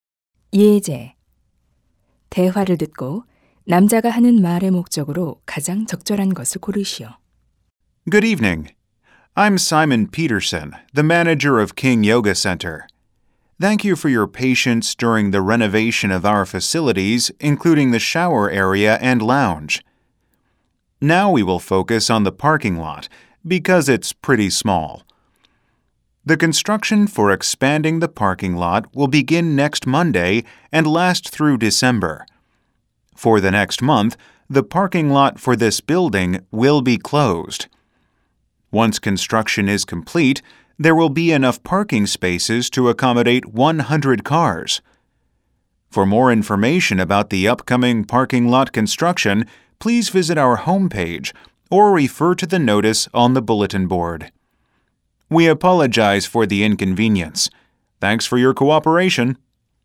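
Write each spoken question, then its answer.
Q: 대화를 듣고 남자가 하는 말의 목적으로 가장 적절한 것을 고르시오.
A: 주차장 확장 공사 일정과 주차장 폐쇄를 안내하려고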